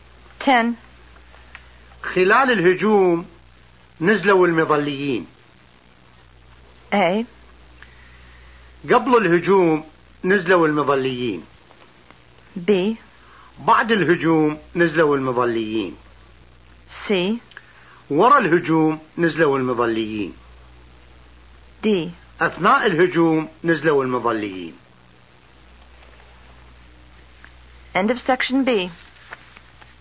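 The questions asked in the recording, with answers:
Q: خلال الهجوم نزلوا المظليين.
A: D: أثناء الهجوم نزلوا المظليين.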